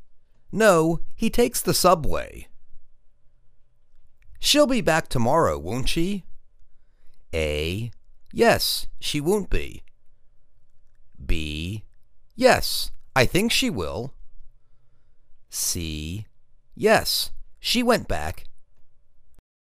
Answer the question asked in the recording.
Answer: Yes, I think she will.